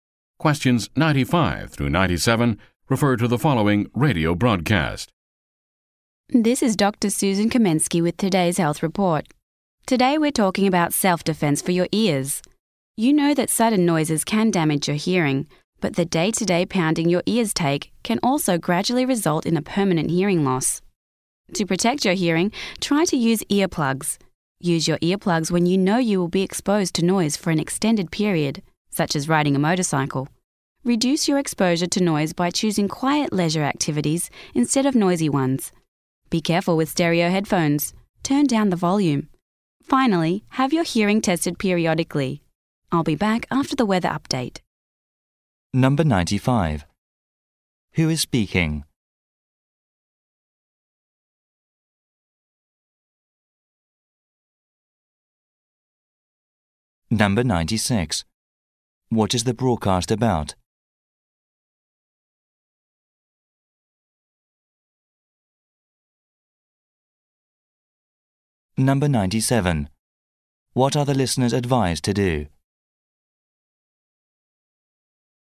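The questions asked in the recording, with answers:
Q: Who is speaking?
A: Dr. Susan Kamensky, a health reporter

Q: What is the broadcast about?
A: Protecting your hearing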